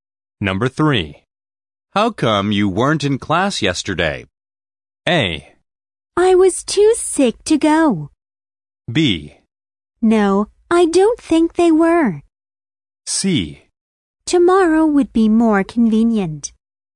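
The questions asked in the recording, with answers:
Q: How come you weren't in class yesterday?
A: A: I was too sick to go.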